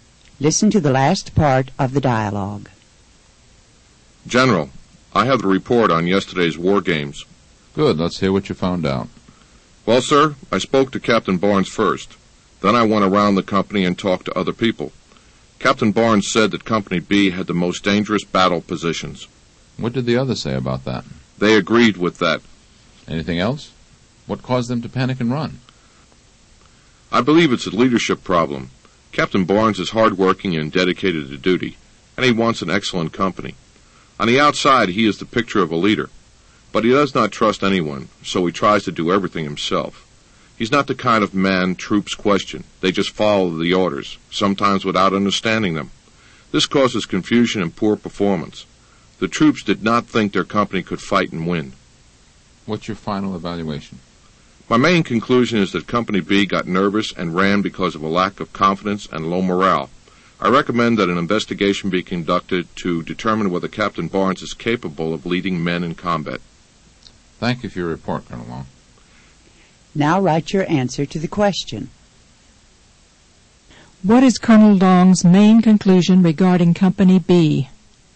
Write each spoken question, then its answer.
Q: What is Colonel Long's main conclusion regarding Company B?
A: Company B got nervous and ran because of a lack of confidence and low morale.